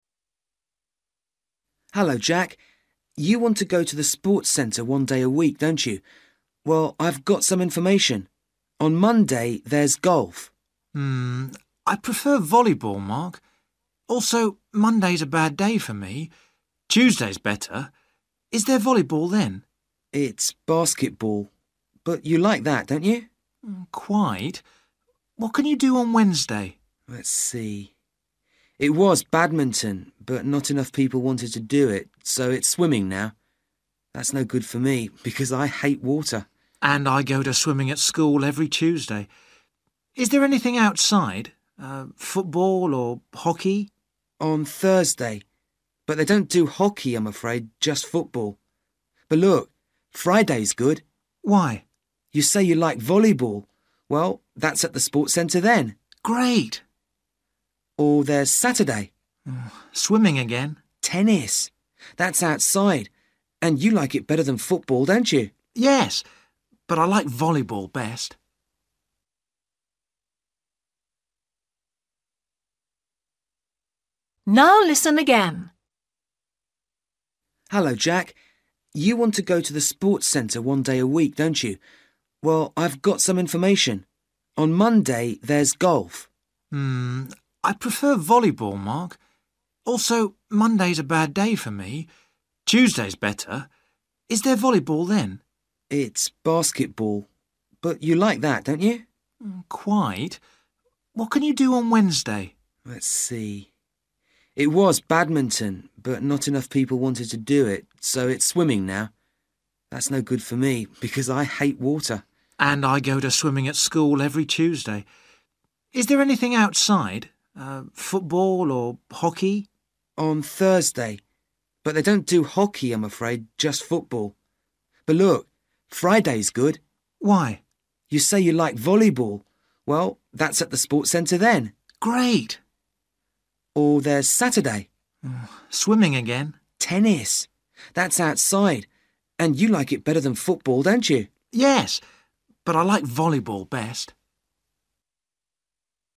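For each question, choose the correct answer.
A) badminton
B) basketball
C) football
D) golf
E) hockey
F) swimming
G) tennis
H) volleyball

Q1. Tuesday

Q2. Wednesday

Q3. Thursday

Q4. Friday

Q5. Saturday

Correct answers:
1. basketball
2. swimming
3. football
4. volleyball
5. tennis

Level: Luyện nghe trình độ A2

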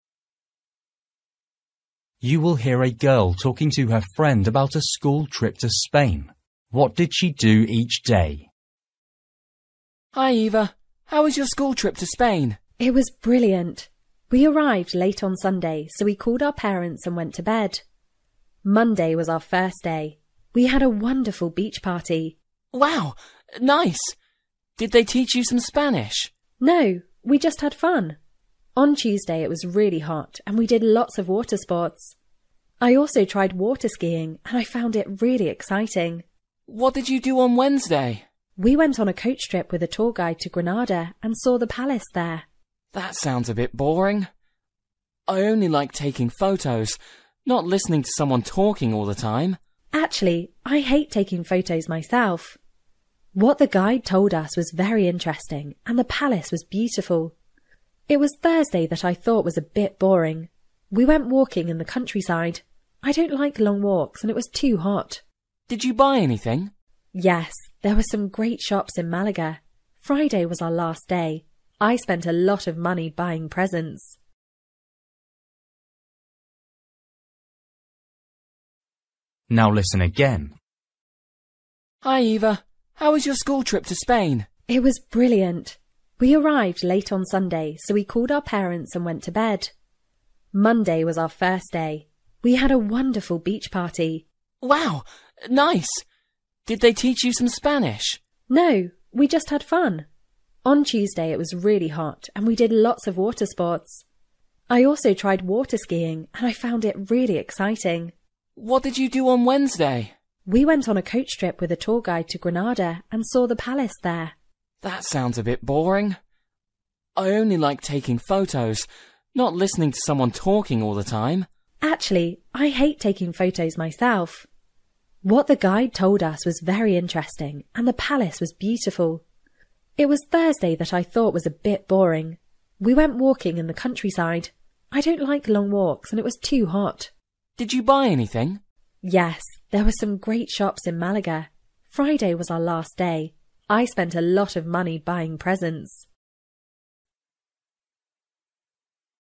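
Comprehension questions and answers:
For each question, choose the correct answer.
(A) water skiing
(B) walking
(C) shopping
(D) listening to a guide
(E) Spanish lessons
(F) taking photos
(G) beach party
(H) phoning parents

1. Monday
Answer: beach party

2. Tuesday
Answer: water skiing

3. Wednesday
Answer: listening to a guide

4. Thursday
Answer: walking

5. Friday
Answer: shopping

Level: Luyện nghe trình độ A2

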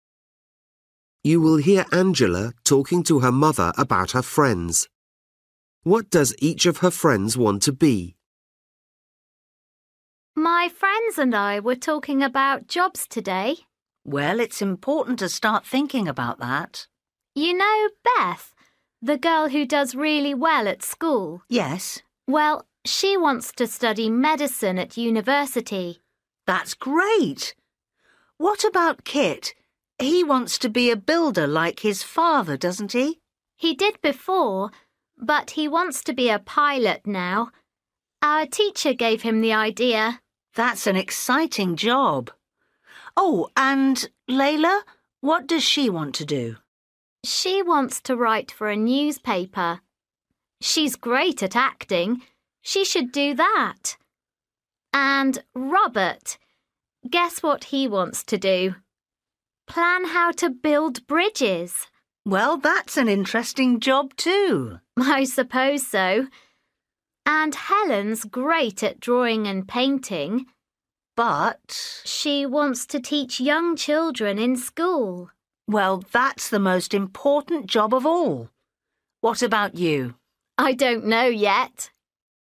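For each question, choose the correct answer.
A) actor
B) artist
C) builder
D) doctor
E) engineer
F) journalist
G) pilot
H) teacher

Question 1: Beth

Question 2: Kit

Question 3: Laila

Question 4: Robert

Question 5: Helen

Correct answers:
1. doctor
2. pilot
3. journalist
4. engineer
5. teacher

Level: Luyện nghe trình độ A2

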